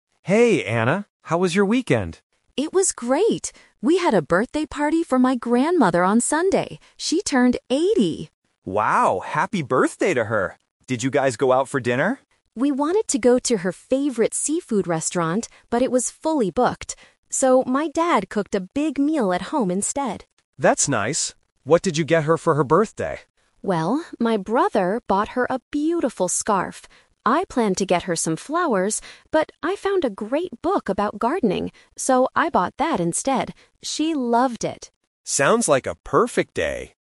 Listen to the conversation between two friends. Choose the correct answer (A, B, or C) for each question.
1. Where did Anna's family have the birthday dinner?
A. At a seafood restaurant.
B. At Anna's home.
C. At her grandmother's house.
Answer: At Anna's home.

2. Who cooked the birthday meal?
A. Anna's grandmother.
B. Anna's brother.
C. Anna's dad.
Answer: Anna's dad.

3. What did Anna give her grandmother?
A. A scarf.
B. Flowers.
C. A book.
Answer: A book.

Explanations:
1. This is "The Twist". Anna says they wanted to go to a seafood restaurant, but it was full. She then says, "my dad cooked a big meal at home instead." Option (A) is a trap because it was their original plan. Option (C) is plausible but not mentioned.
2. Anna clearly states, "my dad cooked a big meal." Option (A) and (B) are plausible family members but are incorrect based on the audio.
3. Here is another "Twist". Anna planned to get flowers, but she changed her mind and bought a book about gardening. Option (B) is a trap because she only planned to buy them. Option (A) is also a trap because the scarf was from her brother, not Anna.

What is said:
Tom: Hey, Anna. How was your weekend?
Anna: It was great! We had a birthday party for my grandmother on Sunday. She turned 80!
Tom: Wow, happy birthday to her! Did you guys go out for dinner?
Anna: We wanted to go to her favorite seafood restaurant, but it was fully booked. So, my dad cooked a big meal at home instead.
Tom: That's nice. What did you get her for her birthday?
Anna: Well, my brother bought her a beautiful scarf. I planned to get her some flowers, but I found a great book about gardening. So, I bought that instead. She loved it!

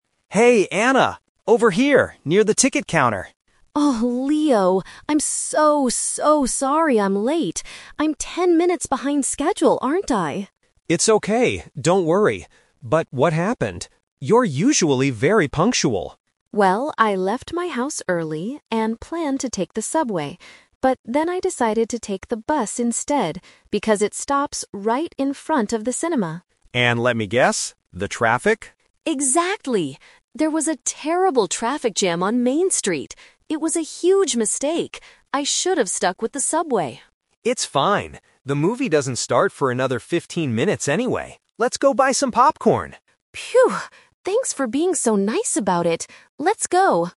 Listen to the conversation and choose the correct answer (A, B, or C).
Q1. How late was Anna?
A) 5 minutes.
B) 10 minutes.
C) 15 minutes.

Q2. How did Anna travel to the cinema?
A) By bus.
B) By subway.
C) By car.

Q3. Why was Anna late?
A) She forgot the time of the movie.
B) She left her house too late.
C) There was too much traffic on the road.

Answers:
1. 10 minutes.
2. By bus.
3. There was too much traffic on the road.

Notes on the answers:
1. Anna asks, "I'm ten minutes behind schedule, aren't I?" (Behind schedule = late). Trap: Option (C) 15 minutes is a trap because the movie starts in 15 minutes, but that's not how late she was.
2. Anna said she "decided to take the bus instead". Trap: Option (B) is a "Twist" trap. She planned to take the subway but changed her mind at the last minute.
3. Anna confirms there was a "terrible traffic jam". Trap: Option (B) is a trap because Anna specifically said "I left my house early", so the time she left was not the problem.

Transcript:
Leo: Hey Anna! Over here, near the ticket counter!
Anna: Oh, Leo! I'm so, so sorry I'm late. I'm ten minutes behind schedule, aren't I?
Leo: It's okay, don't worry. But what happened? You are usually very punctual.
Anna: Well, I left my house early and planned to take the subway. But then I decided to take the bus instead because it stops right in front of the cinema.
Leo: And let me guess... the traffic?
Anna: Exactly! There was a terrible traffic jam on Main Street. It was a huge mistake. I should have stuck with the subway.
Leo: It's fine. The movie doesn't start for another fifteen minutes anyway. Let's go buy some popcorn!

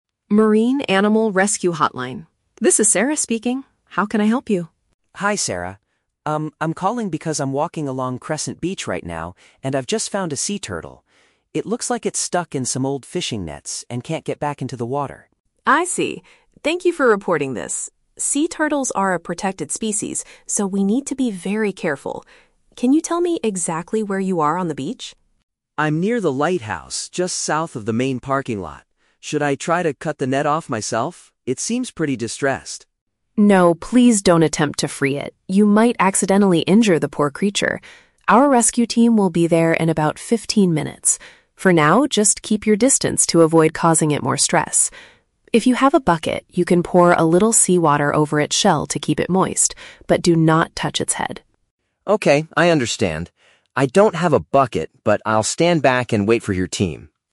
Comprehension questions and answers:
Listen to a telephone conversation between a local resident and an animal rescue operator. Choose the best answer (A, B, or C) for each question.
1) What is the main reason the resident is making the phone call?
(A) To ask for directions to the main parking lot.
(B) To report a sea creature caught in fishing equipment.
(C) To complain about the amount of garbage on the beach.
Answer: To report a sea creature caught in fishing equipment.

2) What does the resident initially offer to do before the team arrives?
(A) Remove the material that is holding the animal.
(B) Carry the animal back into the ocean safely.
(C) Pour a bucket of water over the animal's head.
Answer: Remove the material that is holding the animal.

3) What does the operator instruct the resident to do while waiting?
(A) Use a sharp tool to cut the net carefully.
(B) Take photos of the animal to send to the rescue team.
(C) Stay far away so the animal doesn't get frightened.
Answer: Stay far away so the animal doesn't get frightened.

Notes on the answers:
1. The resident says he found a sea turtle that is "stuck in some old fishing nets." Option B paraphrases this as a "sea creature caught in fishing equipment."
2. The resident asks, "Should I try to cut the net off myself?" Option A paraphrases this action as "Remove the material that is holding the animal."
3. The operator tells the resident to "keep your distance to avoid causing it more stress." Option C uses synonyms: "stay far away" (keep distance) and "frightened" (stressed).

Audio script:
Operator: Marine Animal Rescue Hotline. This is Sarah speaking. How can I help you?
Resident: Hi, Sarah. Um, I'm calling because I'm walking along Crescent Beach right now, and I've just found a sea turtle. It looks like it's stuck in some old fishing nets and can't get back into the water.
Operator: I see. Thank you for reporting this. Sea turtles are a protected species, so we need to be very careful. Can you tell me exactly where you are on the beach?
Resident: I'm near the lighthouse, just south of the main parking lot. Should I try to cut the net off myself? It seems pretty distressed.
Operator: No, please don't attempt to free it. You might accidentally injure the poor creature. Our rescue team will be there in about fifteen minutes. For now, just keep your distance to avoid causing it more stress. If you have a bucket, you can pour a little seawater over its shell to keep it moist, but do not touch its head.
Resident: Okay, I understand. I don't have a bucket, but I'll stand back and wait for your team.

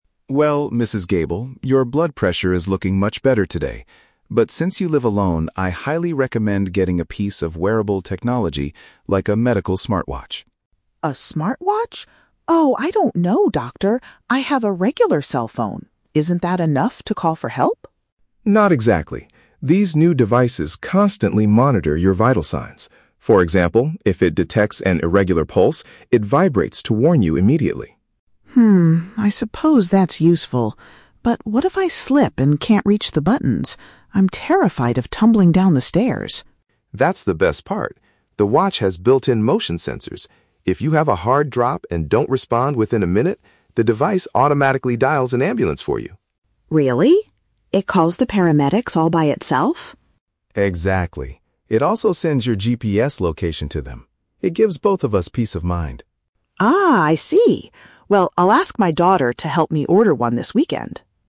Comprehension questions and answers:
Listen to a conversation between a doctor and a patient, then choose the correct answer (A, B, or C) for each question.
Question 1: What will the smartwatch do if the wearer experiences an unusual heartbeat?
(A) It will record her daily blood pressure levels.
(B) It will physically shake to alert the wearer.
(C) It will play a loud sound to wake her up.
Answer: It will physically shake to alert the wearer.

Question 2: How does the device assist if the patient falls down?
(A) It requires the patient to press a warning button.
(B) It sends a text message to her closest relatives.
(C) It contacts emergency medical workers on its own.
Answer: It contacts emergency medical workers on its own.

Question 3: What does Mrs. Gable plan to do at the end of the appointment?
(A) She will purchase the device with a family member's assistance.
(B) She will use her regular cell phone to buy the watch online.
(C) She will go to a local technology store to try the watch on.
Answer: She will purchase the device with a family member's assistance.

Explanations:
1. The doctor says that if the watch detects an "irregular pulse" (unusual heartbeat), it "vibrates to warn you." "Physically shake" is a paraphrase of vibrate, and "alert" means to warn. Why the trap is wrong: Option (A) is the trap. The doctor mentions her "blood pressure" at the very beginning of the conversation, but the watch does not measure this; it monitors her pulse. Option (C) is plausible for an alarm, but it is not mentioned in the audio.
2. The doctor explains that the device "automatically dials an ambulance," and the patient confirms it "calls the paramedics all by itself." "Emergency medical workers" is a paraphrase for paramedics/ambulance. Why the trap is wrong: Option (A) is the trap. The patient asks, "what if I slip and can't reach the buttons?" The watch helps exactly because she does not need to press a button. Option (B) is a plausible feature of a smartwatch, but it is not mentioned in the text.
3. Mrs. Gable says, "I'll ask my daughter to help me order one." "A family member's assistance" is a paraphrase of her daughter helping her. Why the trap is wrong: Option (B) is the trap. She mentions having a "regular cell phone" earlier to call for help, but she does not say she will use it to buy the watch. Option (C) is plausible for an older person shopping, but it is never mentioned.

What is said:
Doctor: Well, Mrs. Gable, your blood pressure is looking much better today. But since you live alone, I highly recommend getting a piece of wearable technology, like a medical smartwatch.
Patient: A smartwatch? Oh, I don't know, Doctor. I have a regular cell phone. Isn't that enough to call for help?
Doctor: Not exactly. These new devices constantly monitor your vital signs. For example, if it detects an irregular pulse, it vibrates to warn you immediately.
I suppose that's useful. But what if I slip and can't reach the buttons? I'm terrified of tumbling down the stairs.
Doctor: That's the best part. The watch has built-in motion sensors. If you have a hard drop and don't respond within a minute, the device automatically dials an ambulance for you.
Patient: Really? It calls the paramedics all by itself?
Doctor: Exactly. It also sends your GPS location to them. It gives both of us peace of mind.

